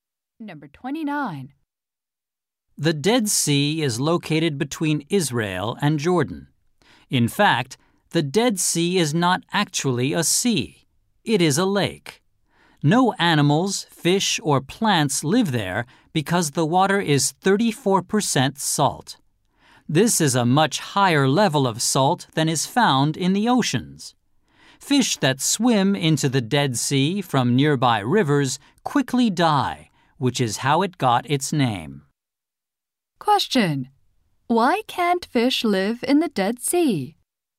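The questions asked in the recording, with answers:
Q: Why can't fish live in the Dead Sea?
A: The water is too salty (34% salt).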